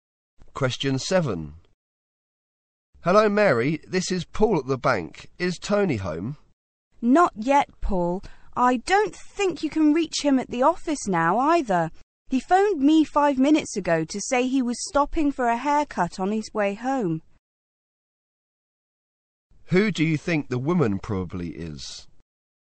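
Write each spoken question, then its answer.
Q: Who do you think the woman probably is?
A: Tony's wife.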